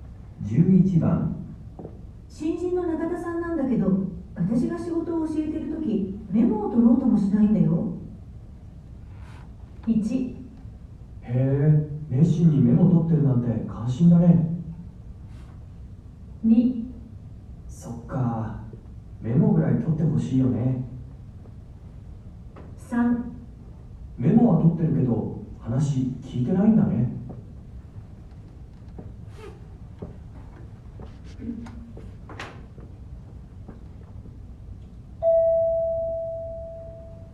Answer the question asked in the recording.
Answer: 2

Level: N1 Listening · Test 2